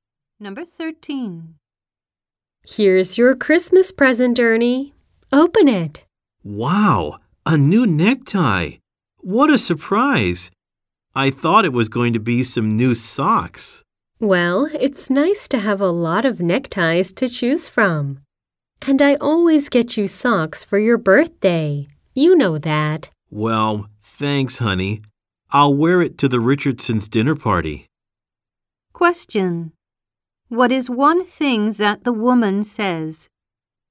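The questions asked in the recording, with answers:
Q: What is one thing that the woman says?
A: She always gets him socks for his birthday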